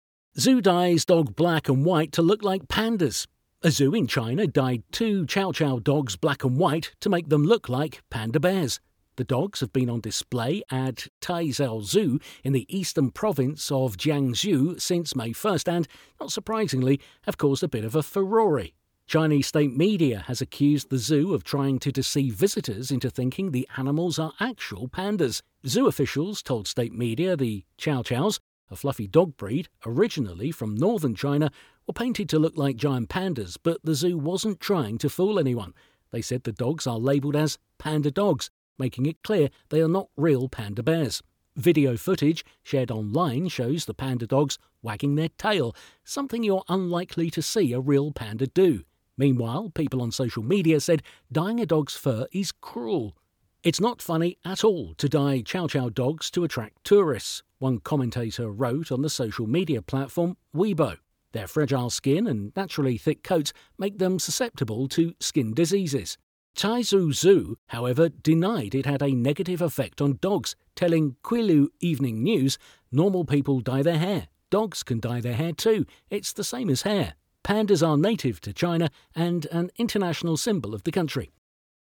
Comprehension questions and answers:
Decide if the statements are true or false.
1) The zoo will continue to dye dogs to resemble other animals in the future.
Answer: Not Given

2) The zoo was praised by Chinese state media for their creative approach.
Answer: False

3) The video footage displayed the 'panda dogs' wagging their tails, a behavior uncommon in real pandas.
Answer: True

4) Animal rights organizations have criticized the zoo's actions.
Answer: Not Given

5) The zoo admitted to causing harm to the dogs by dyeing their fur.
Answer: False

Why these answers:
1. This might be a very logical prediction but there is no information in the text to prove this.
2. Exaggerates the sentiment expressed in the text, misrepresenting the factual data.
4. Maybe animal rights organizations have criticized the zoo's actions, there is no information in the text to either prove or disprove that.
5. This statement implies that the zoo admitted to causing harm to the dogs, but the text says they denied any negative effects.

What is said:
A zoo in China dyed two Chow Chow dogs black and white to make them look like panda bears. The dogs have been on display at Taizhou Zoo in the eastern province of Jiangsu since May 1 and – not surprisingly – have caused a bit of a furore.
Chinese state media has accused the zoo of trying to deceive visitors into thinking the animals are actual pandas. Zoo officials told state media the Chow Chows – a fluffy dog breed originally from northern China – were painted to look like giant pandas but the zoo wasn't trying to fool anyone. They said the dogs are labelled as 'panda dogs', making it clear they are not real panda bears.
Video footage shared online shows the 'panda dogs' wagging their tale, something you're unlikely to see a real panda do. Meanwhile people on social media said dying a dog's fur is cruel.
'It is not funny at all to dye Chow Chow dogs to attract tourists,' one commenter wrote on the social media platform Weibo. 'Their fragile skin and naturally thick coats make them susceptible to skin diseases.'
Taizhou Zoo, however, denied it had a negative affect on dogs, telling Qilu Evening News: 'Normal people dye their hair. 'Dogs can dye their hair, too. It's the same as hair.'
Pandas are native to China and an international symbol of the country.